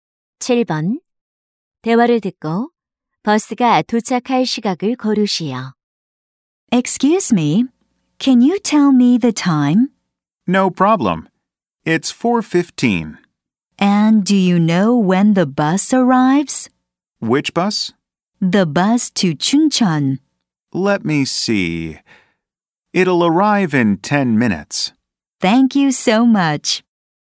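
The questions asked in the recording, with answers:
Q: 대화를 듣고 버스가 도착할 시각을 고르시오.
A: 4시 25분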